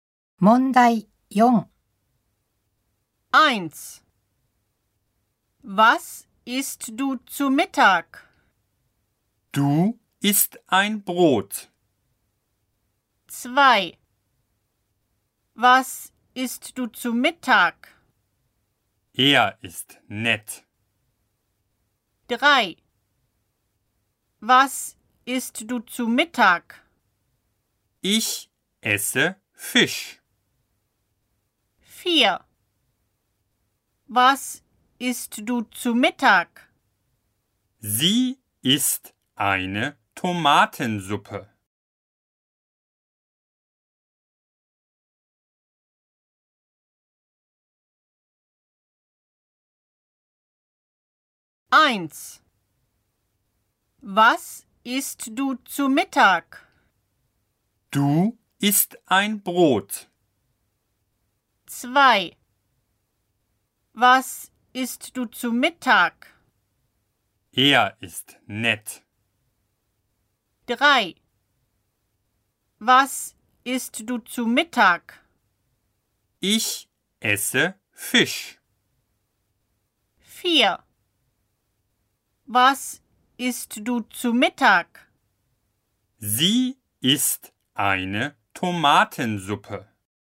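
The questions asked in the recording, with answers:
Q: Was isst du zu Mittag?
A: 3: Ich esse Fisch.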